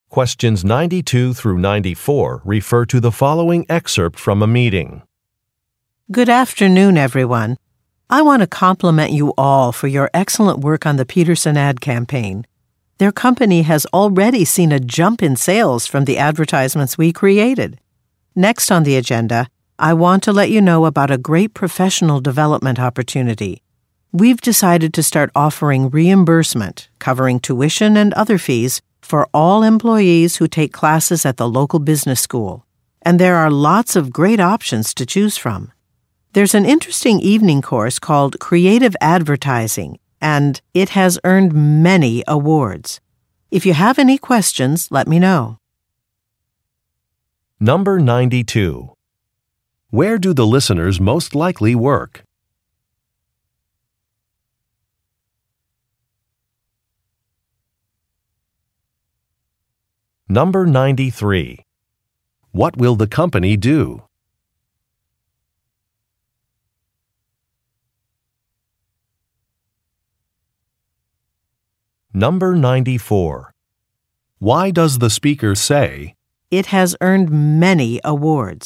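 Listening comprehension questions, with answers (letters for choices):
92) Where do the listeners most likely work?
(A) At an art gallery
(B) At a fitness center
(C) At a department store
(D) At an advertising agency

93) What will the company do?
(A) Require some training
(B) Invest in a system upgrade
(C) Pay for some classes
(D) Add some vacation days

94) Why does the speaker say, "it has earned many awards"?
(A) To explain a policy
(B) To make a recommendation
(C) To offer congratulations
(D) To correct a mistake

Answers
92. D
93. C
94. B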